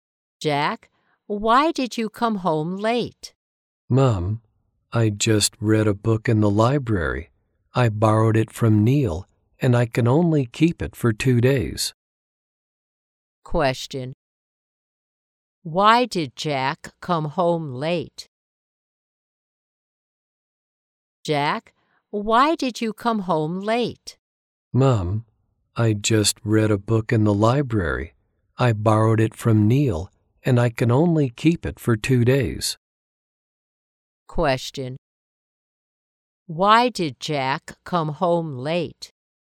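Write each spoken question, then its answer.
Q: Why did Jack come home late?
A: He was reading a book in the library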